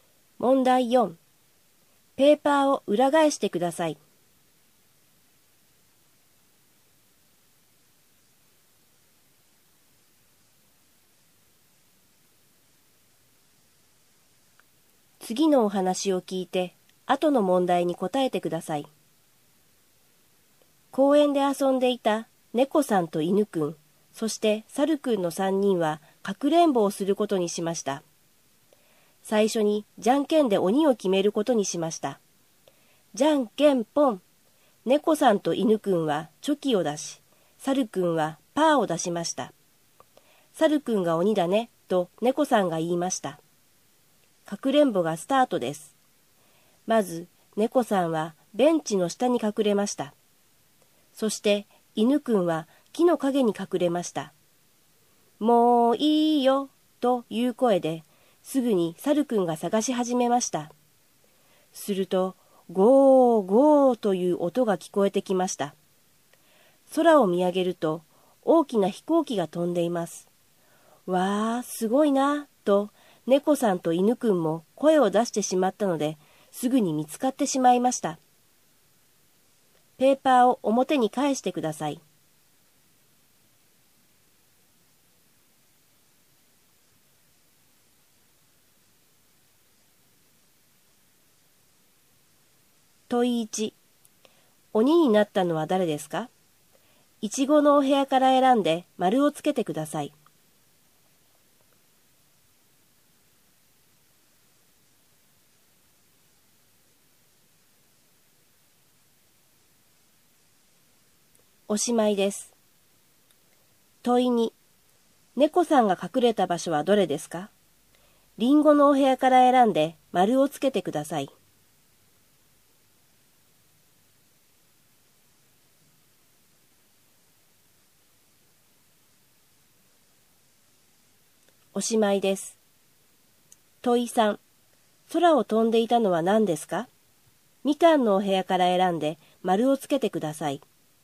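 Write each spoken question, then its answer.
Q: 鬼になったのは誰ですか?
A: 猿くん

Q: 猫さんが隠れた場所はどれですか?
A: ベンチの下

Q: 空を飛んでいたのは何ですか?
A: 飛行機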